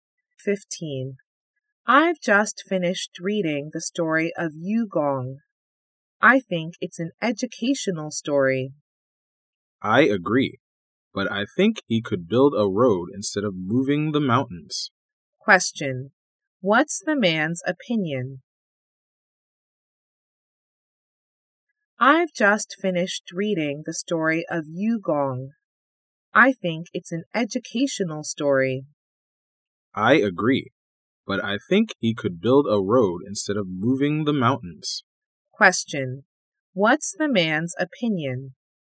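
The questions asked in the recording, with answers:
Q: What's the man's opinion?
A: Yugong could build a road instead of moving the mountains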